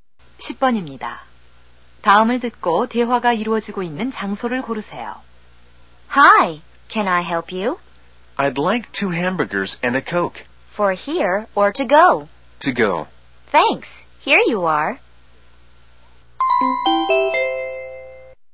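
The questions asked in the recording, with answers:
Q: 다음을 듣고 대화가 이루어지고 있는 장소를 고르세요.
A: 패스트푸드 음식점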